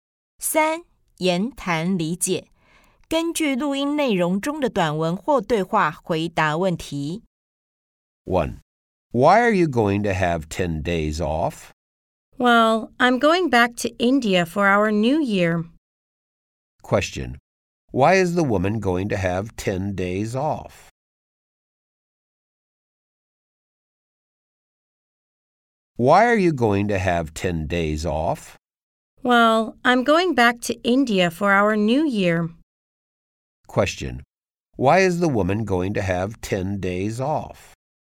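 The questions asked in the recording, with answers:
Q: Why is the woman going to have 10 days off?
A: She's going back to India for their New Year.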